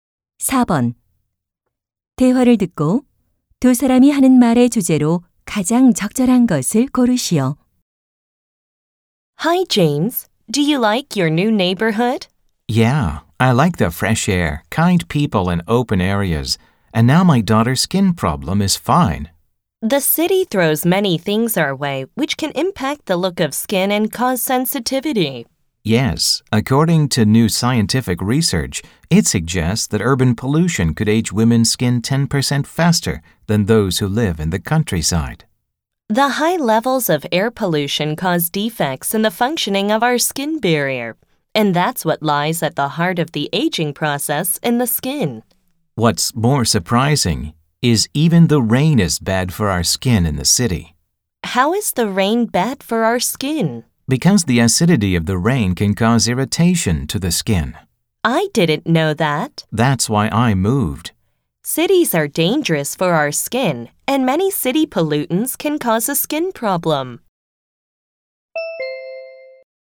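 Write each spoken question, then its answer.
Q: 대화를 듣고 두 사람이 하는 말의 주제로 가장 적절한 것을 고르시오.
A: 도시 오염이 피부에 미치는 악영향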